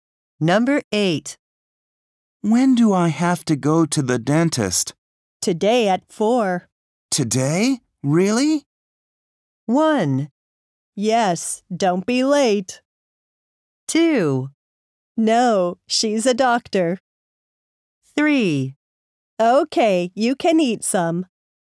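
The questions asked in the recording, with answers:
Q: Today? Really?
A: 1: Yes, don't be late.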